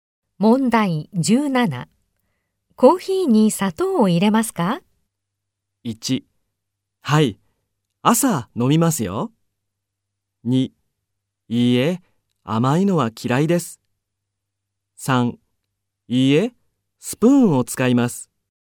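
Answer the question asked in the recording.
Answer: 2: いいえ、甘いのは嫌いです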